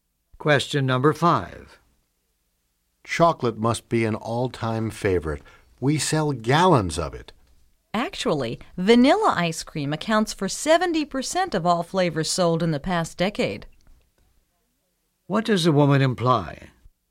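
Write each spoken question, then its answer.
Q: What does the woman imply?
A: Vanilla, not chocolate, is the most popular flavor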